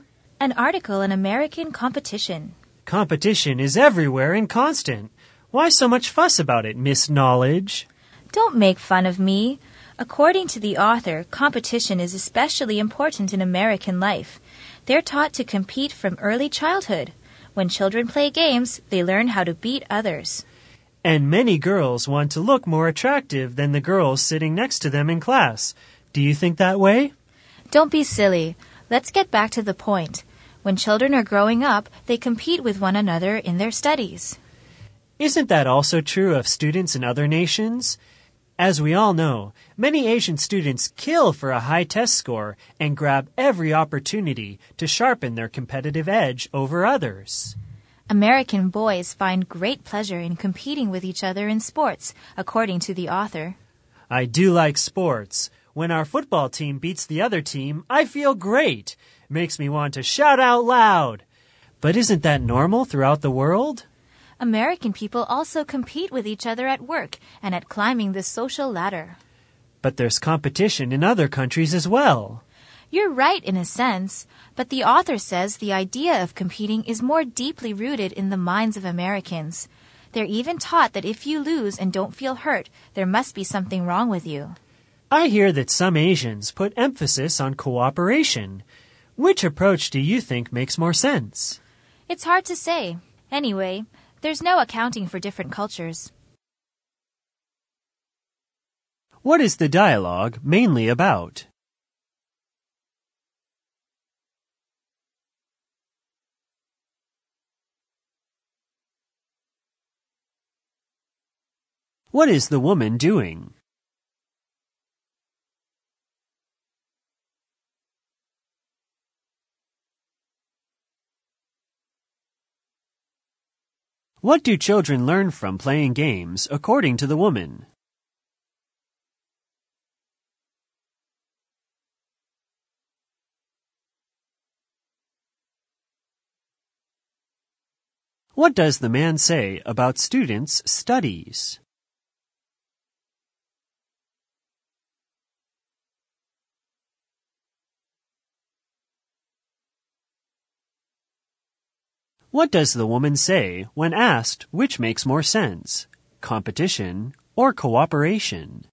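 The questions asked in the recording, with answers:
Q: What is the dialogue mainly about?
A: Competition in American life

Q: What is the woman doing?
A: Reading an article on American competition

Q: What do children learn from playing games, according to the woman?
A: How to beat others

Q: What does the man say about students' studies?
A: Students in other nations also compete in their studies

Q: What does the woman say when asked which makes more sense, competition or cooperation?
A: It's hard to say; there's no accounting for different cultures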